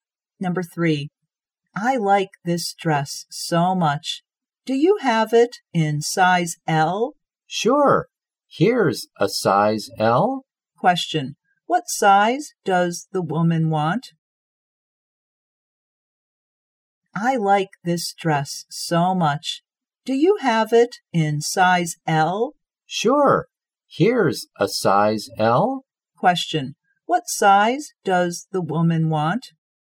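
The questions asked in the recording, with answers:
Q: what size does the woman want?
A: Size L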